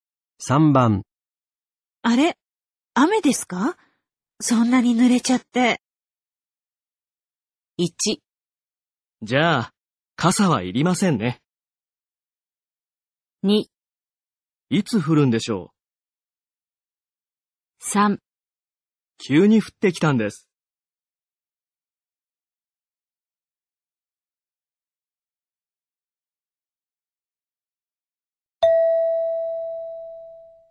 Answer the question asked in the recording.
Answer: 3

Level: N3 Listening · Test 15